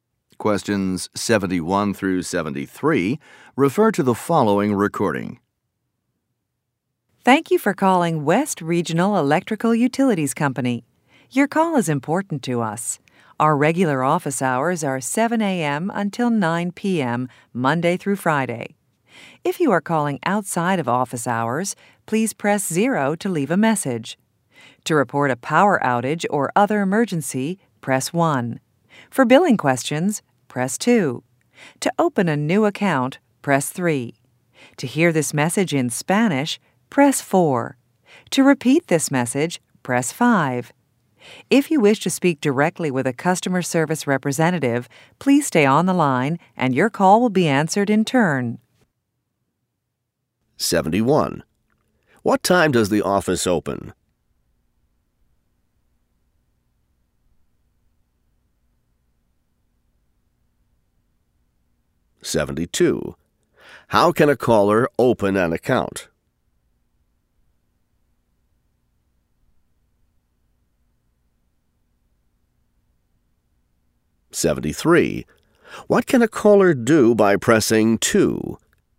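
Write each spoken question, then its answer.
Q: What time does the office open?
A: 7 a.m.

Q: How can a caller open an account?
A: By pressing 3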